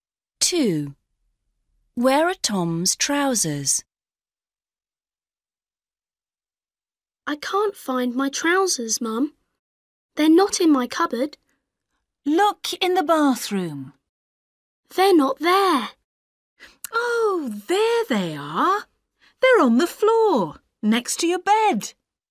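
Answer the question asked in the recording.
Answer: On the floor, next to his bed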